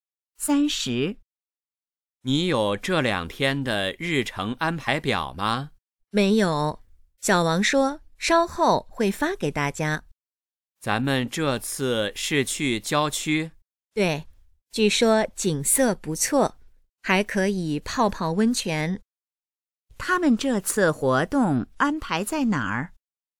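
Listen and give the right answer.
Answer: 郊区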